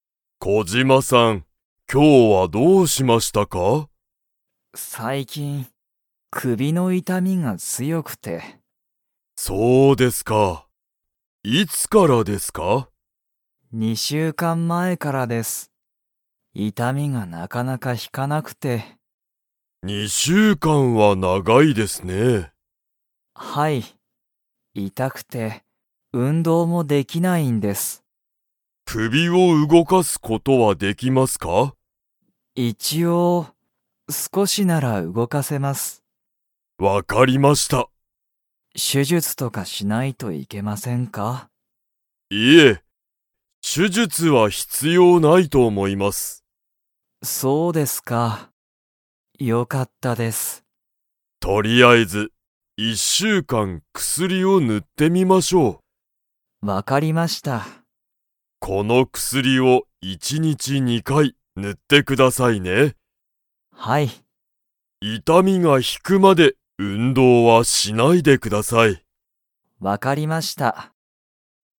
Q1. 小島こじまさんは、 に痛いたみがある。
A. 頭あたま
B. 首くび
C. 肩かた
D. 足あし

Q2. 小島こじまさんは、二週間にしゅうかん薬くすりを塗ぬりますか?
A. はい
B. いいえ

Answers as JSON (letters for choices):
{"1": "B", "2": "B"}

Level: Level 4